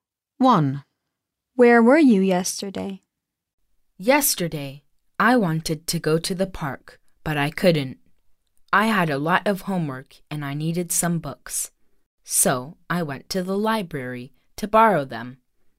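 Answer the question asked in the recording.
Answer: At the library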